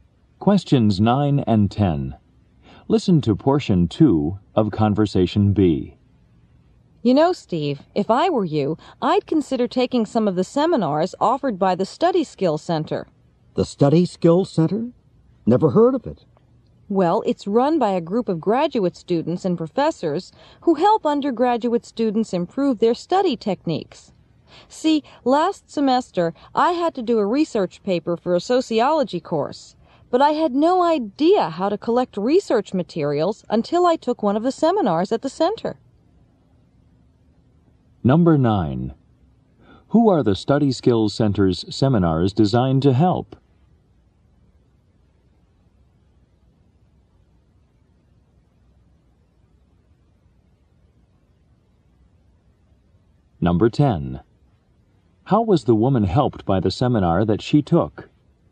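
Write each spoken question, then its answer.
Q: Who are the Study Skills Center's seminars designed to help?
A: Undergraduate students

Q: How was the woman helped by the seminar that she took?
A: She learned how to collect research materials for a research paper.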